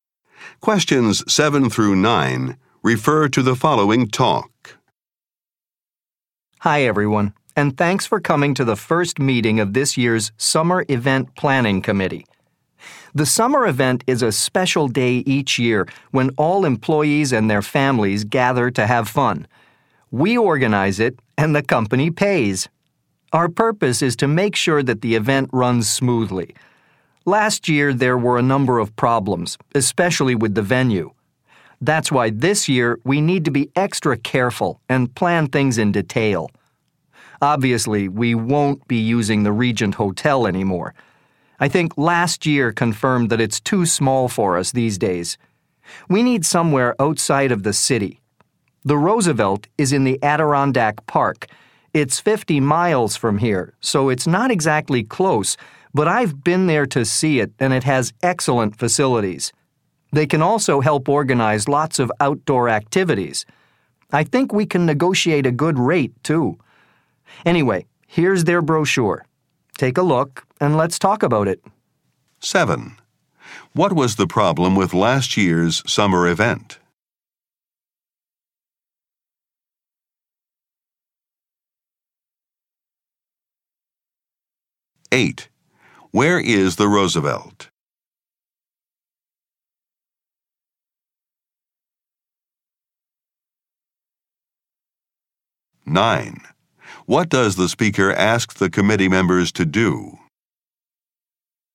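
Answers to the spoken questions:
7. The venue was too small
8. In the Adirondack Park, 50 miles away
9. Look at the brochure and discuss it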